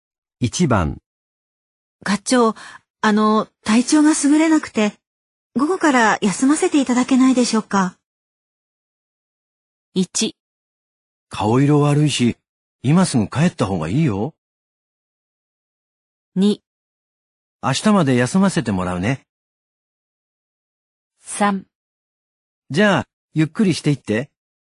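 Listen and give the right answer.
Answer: 1: 顔色悪いし、今すぐ帰った方がいいよ。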